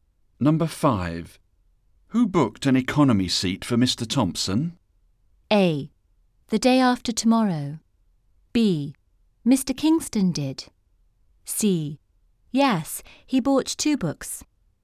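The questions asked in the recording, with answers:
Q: Who booked an economy seat for Mr. Thompson?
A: B: Mr. Kingston did.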